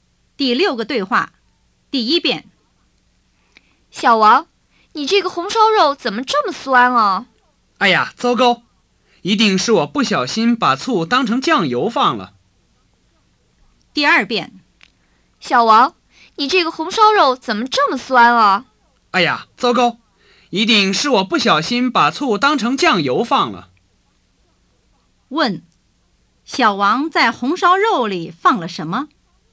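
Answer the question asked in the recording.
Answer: 醋(他把醋当成酱油放了)。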